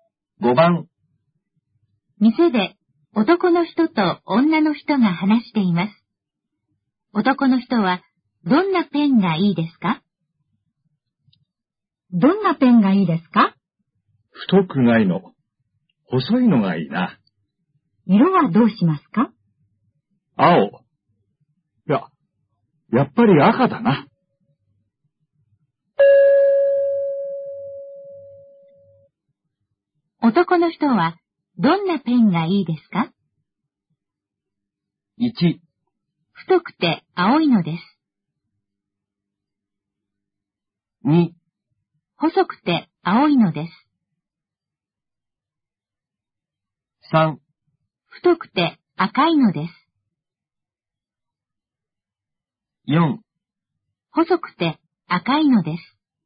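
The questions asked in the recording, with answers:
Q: 男の人はどんなペンがいいですか?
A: 4: 細くて赤いのです。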